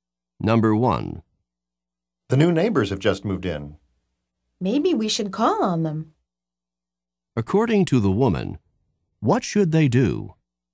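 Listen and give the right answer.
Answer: Visit the new neighbors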